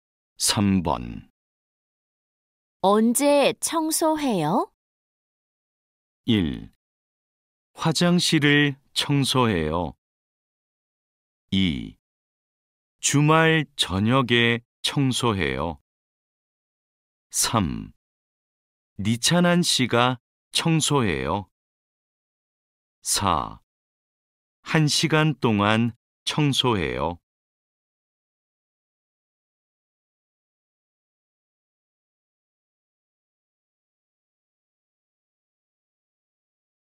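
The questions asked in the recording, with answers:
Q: 언제 청소해요?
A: 2: 주말 저녁에 청소해요.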